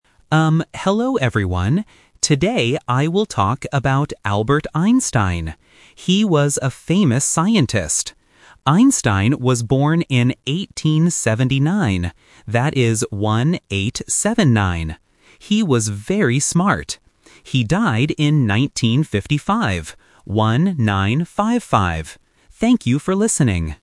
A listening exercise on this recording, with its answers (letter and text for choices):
Listen to the student's presentation. Choose the correct answer (A, B, or C) for each question.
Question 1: Who is the student talking about?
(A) A famous doctor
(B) A famous scientist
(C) A famous teacher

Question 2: When was Albert Einstein born?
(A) 1879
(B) 1897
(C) 1955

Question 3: What year did he die?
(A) 1915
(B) 1879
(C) 1955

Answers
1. (B) A famous scientist
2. (A) 1879
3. (C) 1955

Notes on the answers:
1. The student says: "He was a famous scientist." Option (A) and (C) are not mentioned in the script.
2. The student clearly says "born in 1879" and even spells out the numbers "one-eight-seven-nine". Option (B) is a trap because "1897" sounds similar to "1879". Option (C) is his death year.
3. The student says "He died in 1955". Option (B) is his birth year (the trap). Option (A) is not mentioned.

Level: A1